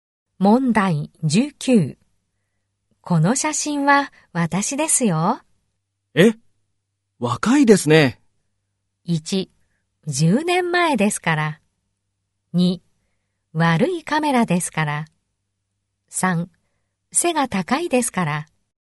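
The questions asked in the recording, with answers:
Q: この写真は私ですよ。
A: 1: 10年前ですから。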